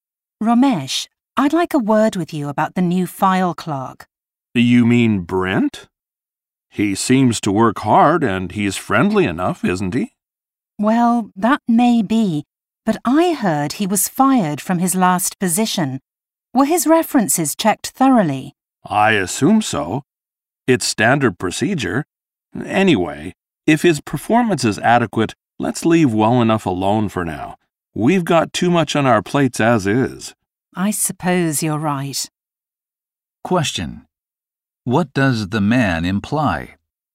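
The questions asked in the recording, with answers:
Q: What does the man imply?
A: They should not worry about Brent's past as long as his work is adequate.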